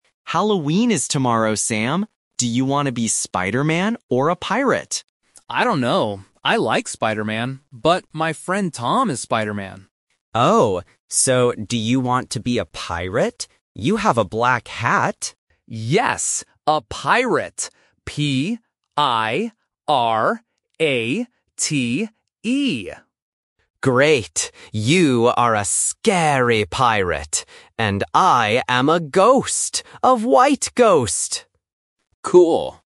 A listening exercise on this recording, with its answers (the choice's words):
Listen to the conversation and choose the correct answer (A, B, or C).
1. What costume does Sam choose?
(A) Spider-man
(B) A pirate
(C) A ghost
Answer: A pirate

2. What color is Sam's hat?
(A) White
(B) Red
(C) Black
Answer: Black

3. Who is going to be a ghost?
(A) Leo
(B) Sam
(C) Tom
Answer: Leo

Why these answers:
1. Sam says "Yes! A pirate!" and spells the word "P-I-R-A-T-E". Trap: Option (A) is a trap. Sam likes Spider-man, but he does not choose it because his friend Tom is Spider-man. Option (C) is also a trap because his brother Leo is the ghost.
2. Leo says, "You have a black hat." Trap: Option (A) is a trap because "white" is the color of the ghost. Option (B) is not mentioned in the audio.
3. Leo says, "And I am a ghost. A white ghost!" Trap: Option (B) is incorrect because Sam is the pirate. Option (C) is a trap because Tom is Spider-man.

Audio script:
Leo: Halloween is tomorrow, Sam! Do you want to be Spider-man or a pirate?
Sam: I don't know. I like Spider-man, but my friend Tom is Spider-man.
Leo: Oh. So, do you want to be a pirate? You have a black hat.
Sam: Yes! A pirate! P-I-R-A-T-E.
Leo: Great! You are a scary pirate. And I am a ghost. A white ghost!
Sam: Cool!

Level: A1